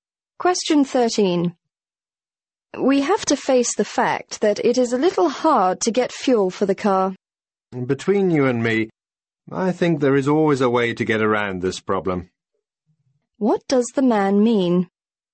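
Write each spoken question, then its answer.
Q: What does the man mean?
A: There is always a way to get around the fuel problem.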